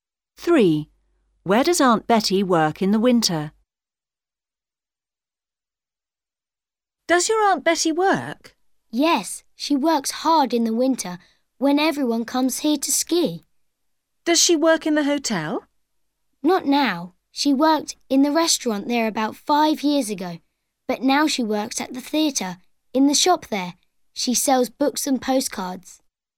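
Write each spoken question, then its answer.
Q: Where does Aunt Betty work in the winter?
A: In the shop at the theatre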